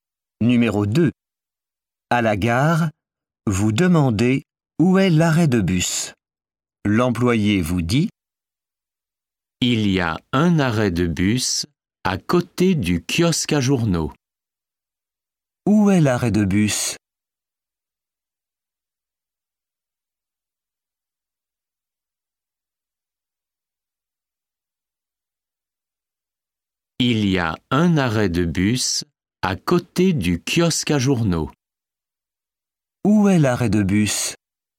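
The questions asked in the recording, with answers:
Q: Où est l'arrêt de bus ?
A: À côté du kiosque à journaux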